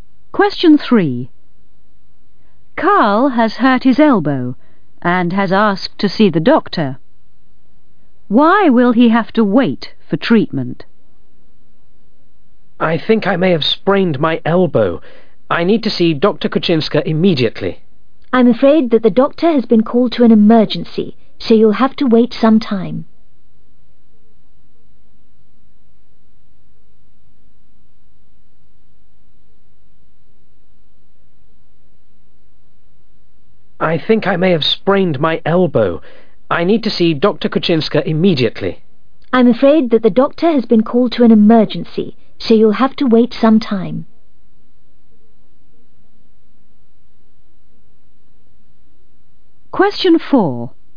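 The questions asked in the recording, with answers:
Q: Why will he have to wait for treatment?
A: The doctor has been called to an emergency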